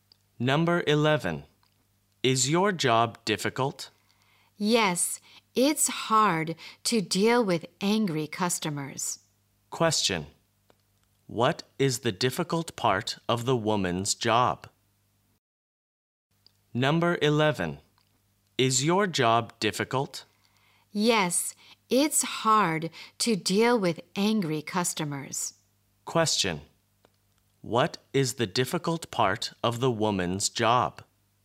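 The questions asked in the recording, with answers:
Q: What is the difficult part of the woman's job?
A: Dealing with angry customers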